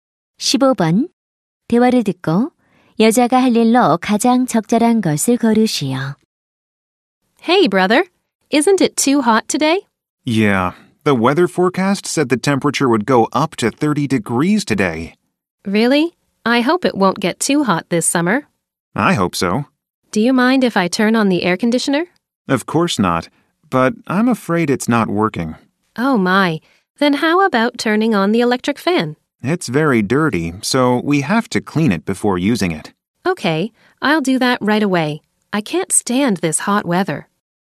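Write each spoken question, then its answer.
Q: 대화를 듣고 여자가 할 일로 가장 적절한 것을 고르시오.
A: 선풍기 청소하기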